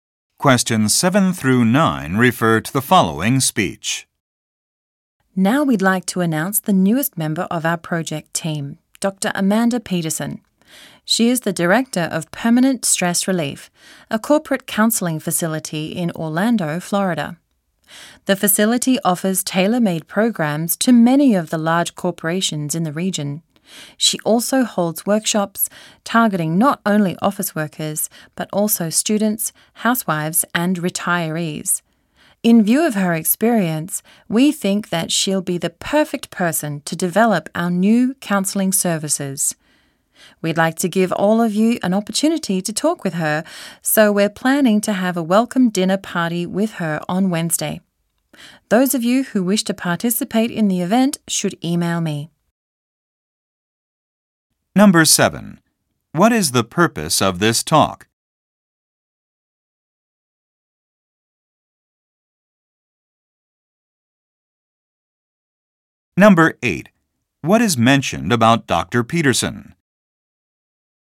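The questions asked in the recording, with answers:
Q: What is the purpose of this talk?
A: To introduce a new project team member

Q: What will happen on Wednesday?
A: A welcome dinner party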